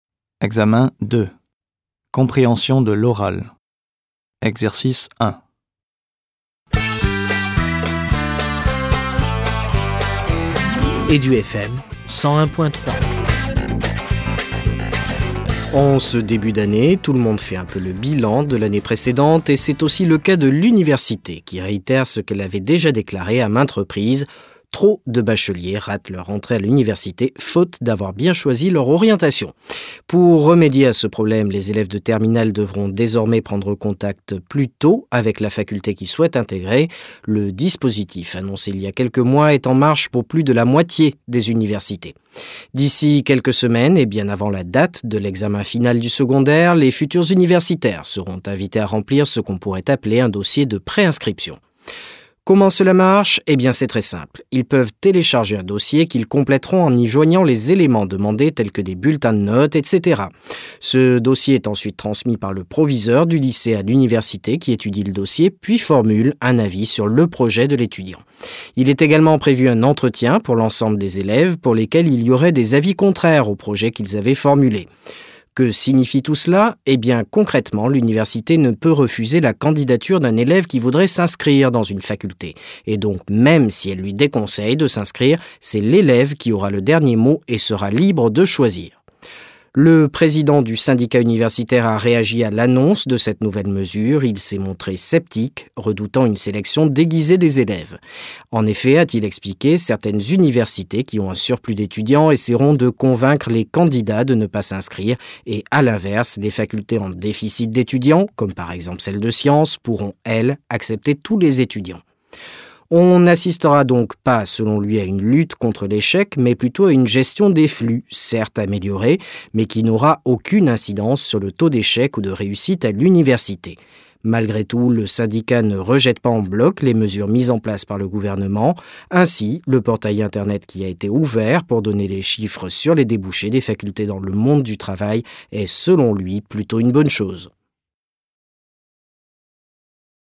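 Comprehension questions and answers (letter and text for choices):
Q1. cet extrait radiophonique est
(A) un débat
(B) un reportage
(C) un communiqué officiel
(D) une publicité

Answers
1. (B) un reportage

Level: Delf B2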